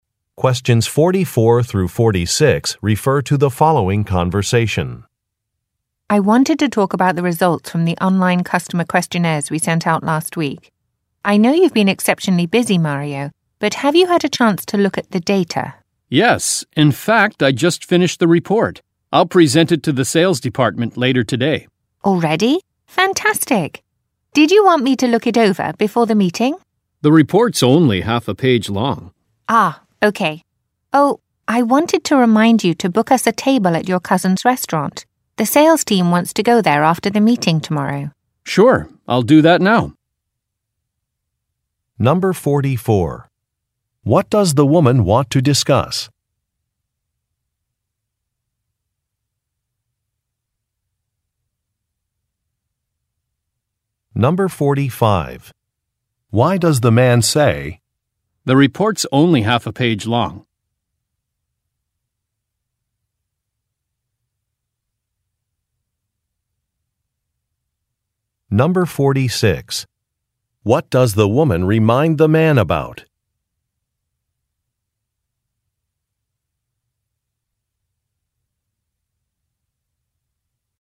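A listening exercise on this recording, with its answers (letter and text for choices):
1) What does the woman want to discuss?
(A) Job candidates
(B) Vendor selections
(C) Customer survey results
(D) Computer system updates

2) Why does the man say, "The report's only half a page long"?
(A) To confirm some details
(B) To express disappointment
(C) To ask for another assignment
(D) To refuse an offer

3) What does the woman remind the man about?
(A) Checking a social media account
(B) Unpacking some equipment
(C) Making a reservation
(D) Going to a print shop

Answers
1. (C) Customer survey results
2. (D) To refuse an offer
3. (C) Making a reservation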